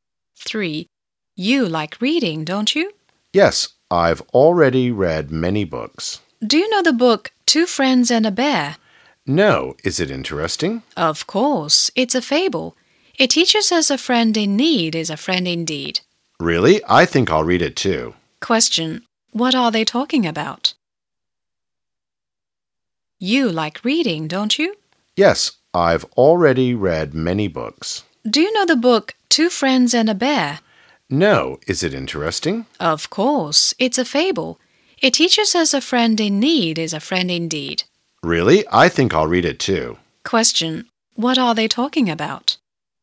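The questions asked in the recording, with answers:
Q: What are they talking about?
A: A book (the fable Two Friends and a Bear)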